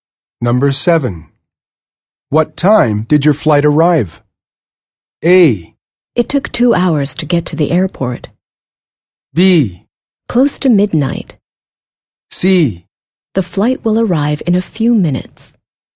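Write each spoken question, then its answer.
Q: What time did your flight arrive?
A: B: Close to midnight.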